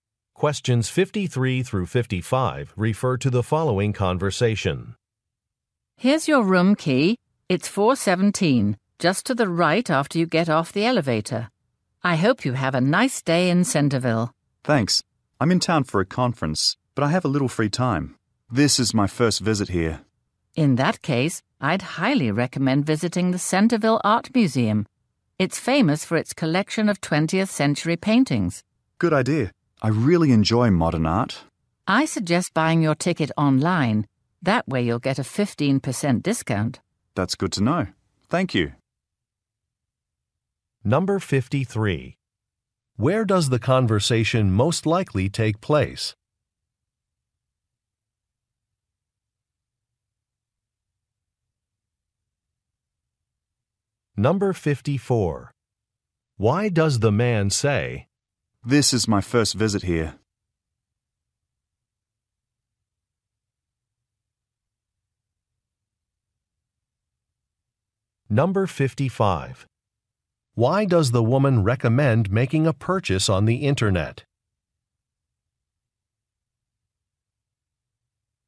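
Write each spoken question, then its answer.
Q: Where does the conversation most likely take place?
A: At a hotel

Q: Why does the woman recommend making a purchase on the internet?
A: To get a 15% discount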